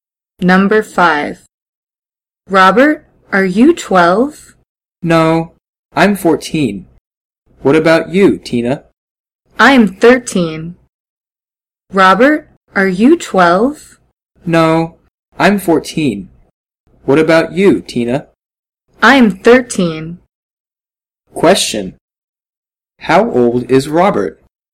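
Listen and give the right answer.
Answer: 14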